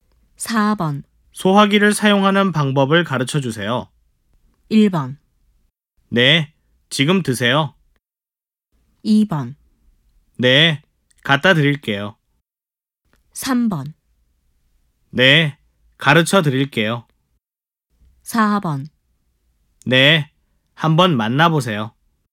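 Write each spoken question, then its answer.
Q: 소화기를 사용하는 방법을 가르쳐 주세요.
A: 3: 네, 가르쳐 드릴게요.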